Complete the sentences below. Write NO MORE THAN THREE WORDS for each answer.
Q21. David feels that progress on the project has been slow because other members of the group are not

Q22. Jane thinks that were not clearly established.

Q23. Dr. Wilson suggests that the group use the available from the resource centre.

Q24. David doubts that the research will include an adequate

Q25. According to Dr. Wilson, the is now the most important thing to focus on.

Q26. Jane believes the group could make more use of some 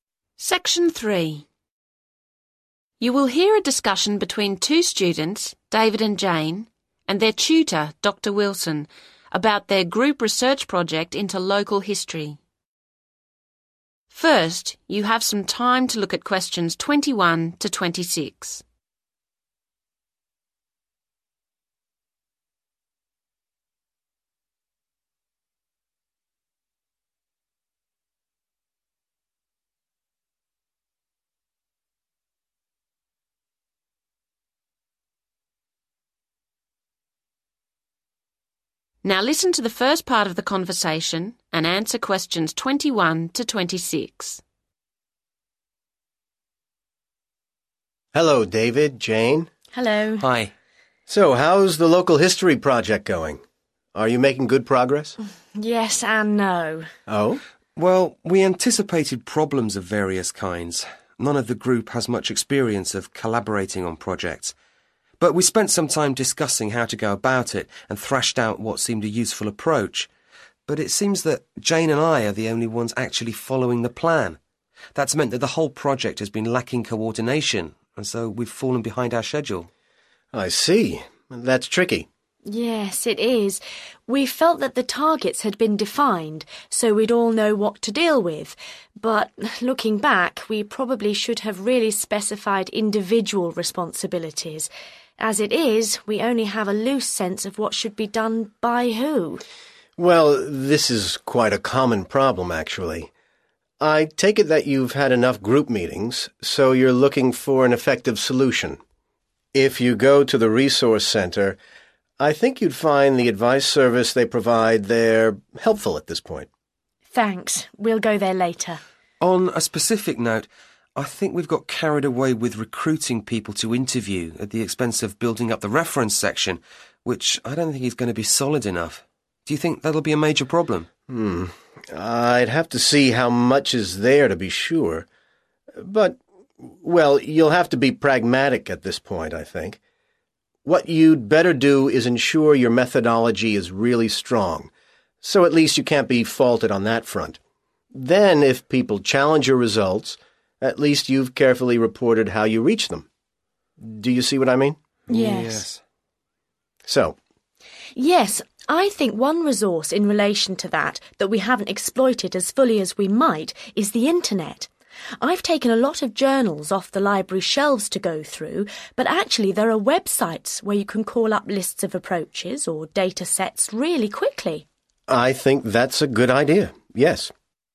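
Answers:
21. following the plan
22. individual responsibilities
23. advice service
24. reference section
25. methodology
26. websites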